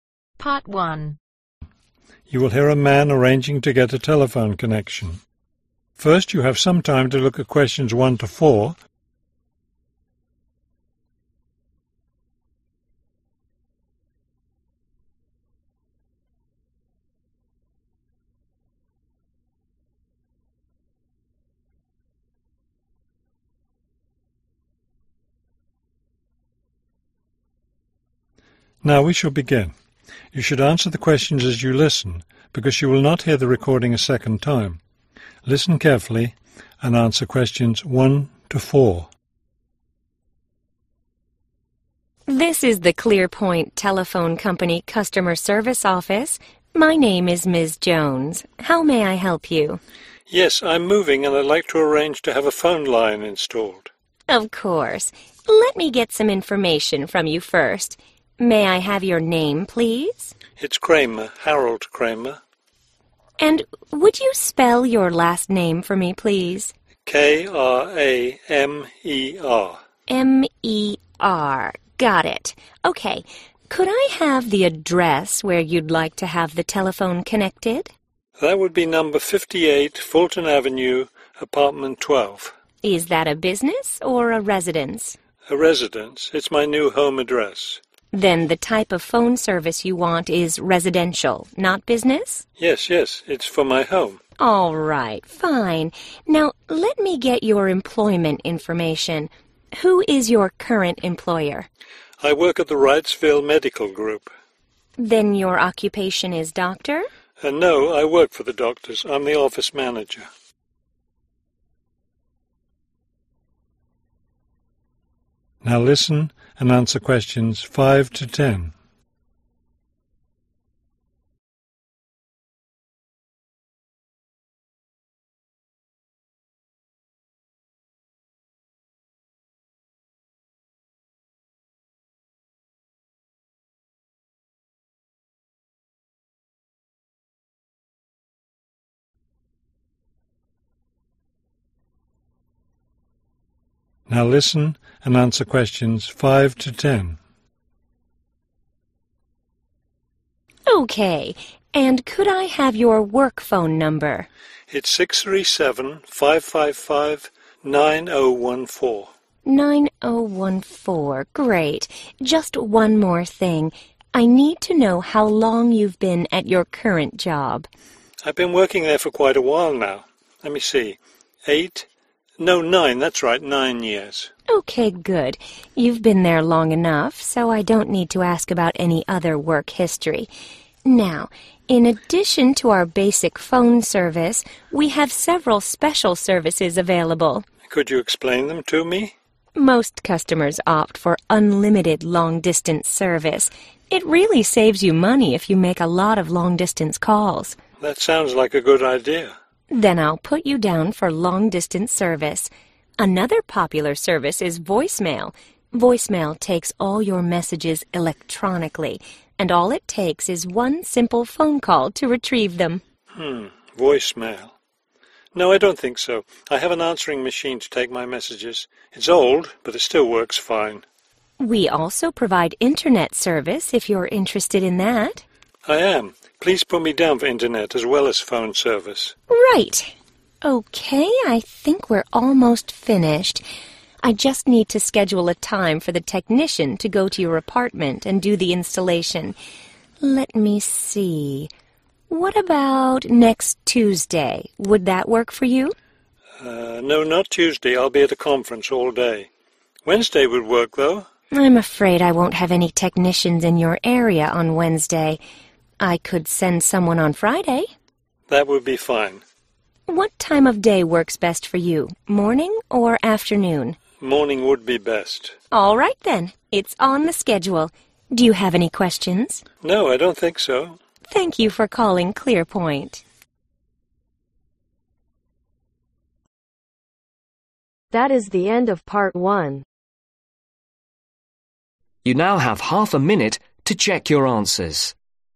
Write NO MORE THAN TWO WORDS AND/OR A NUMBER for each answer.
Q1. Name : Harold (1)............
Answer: Kramer

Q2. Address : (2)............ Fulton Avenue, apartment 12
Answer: 58

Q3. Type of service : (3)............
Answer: Residential

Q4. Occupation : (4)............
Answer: Office Manager

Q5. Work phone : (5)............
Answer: 637-555-9014

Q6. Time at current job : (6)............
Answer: Nine Years

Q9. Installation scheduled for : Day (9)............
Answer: Friday